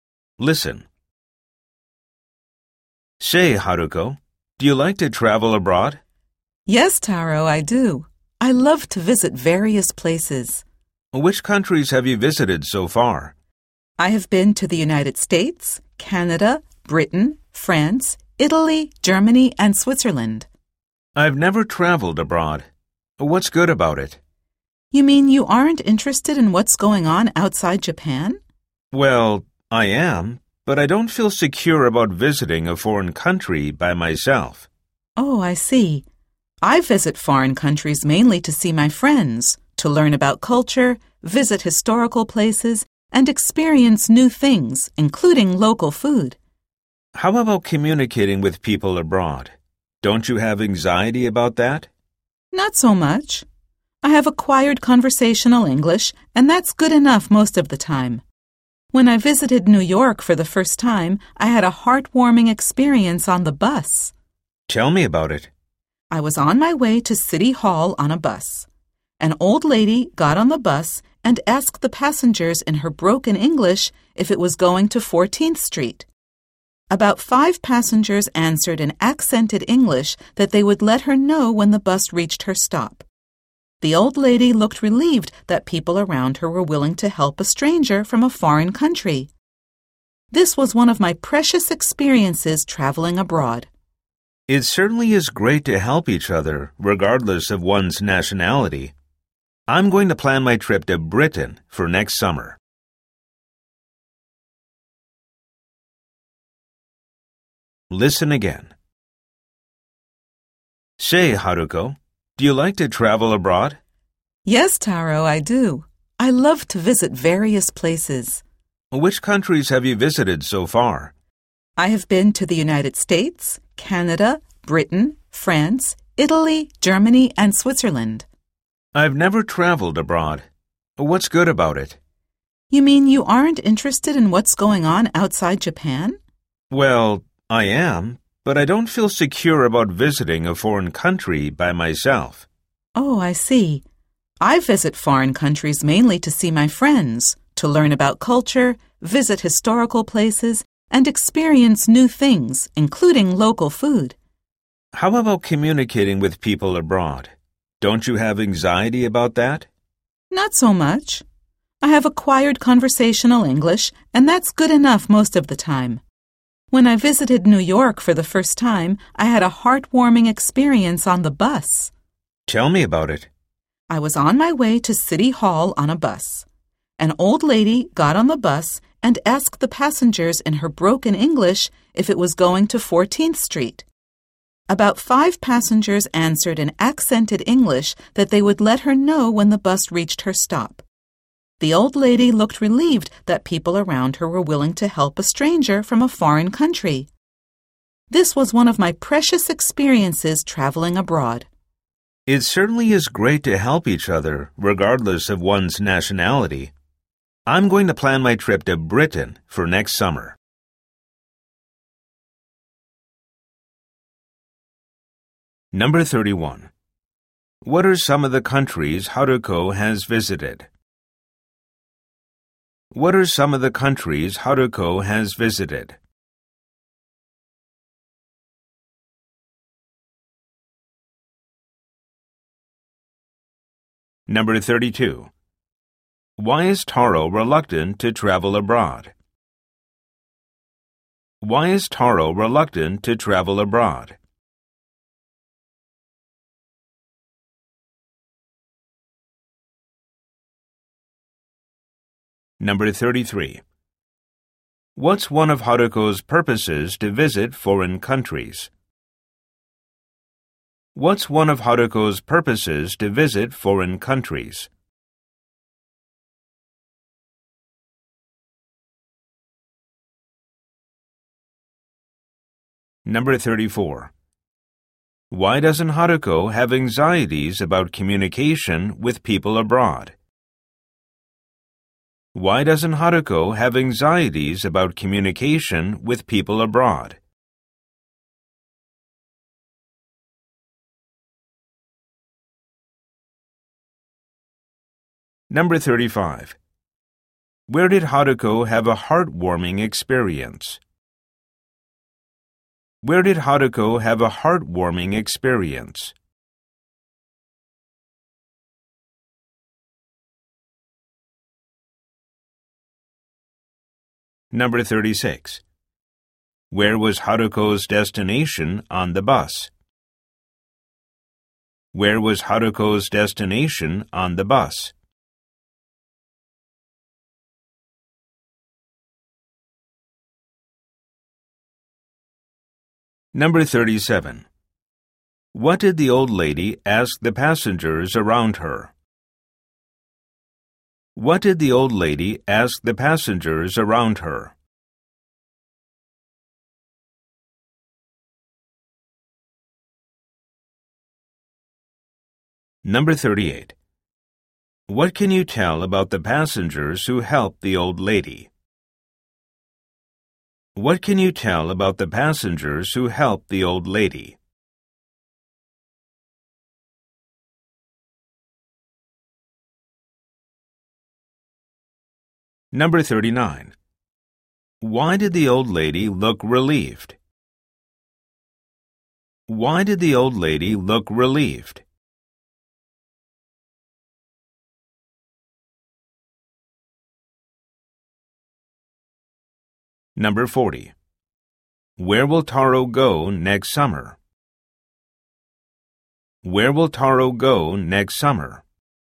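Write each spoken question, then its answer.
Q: What are some of the countries Haruko has visited?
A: The United States, Canada, Britain, France, Italy, Germany and Switzerland

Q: Why is Taro reluctant to travel abroad?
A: He doesn't feel secure visiting a foreign country by himself

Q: What's one of Haruko's purposes to visit foreign countries?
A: To see her friends

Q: Why doesn't Haruko have anxieties about communication with people abroad?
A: She has acquired conversational English

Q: Where did Haruko have a heartwarming experience?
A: On a bus in New York

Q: Where was Haruko's destination on the bus?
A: City Hall

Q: What did the old lady ask the passengers around her?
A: If the bus was going to 14th Street

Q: Why did the old lady look relieved?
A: People around her were willing to help a stranger from a foreign country

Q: Where will Taro go next summer?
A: Britain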